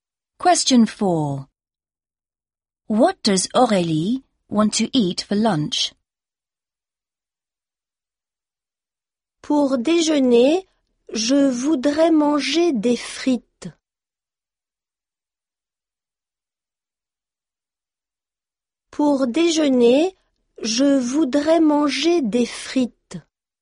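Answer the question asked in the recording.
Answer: Chips (fries)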